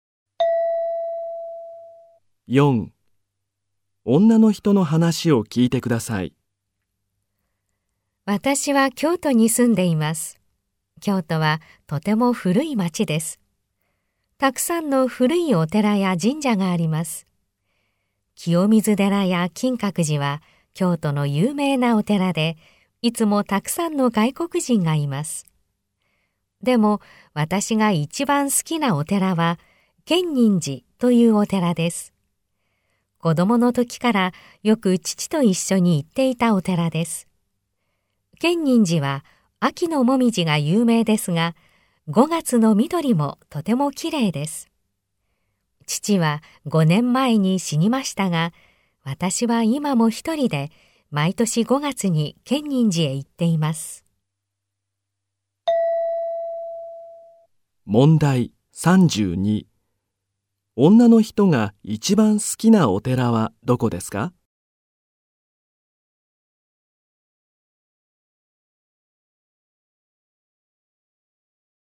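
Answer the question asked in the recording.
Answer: 建仁寺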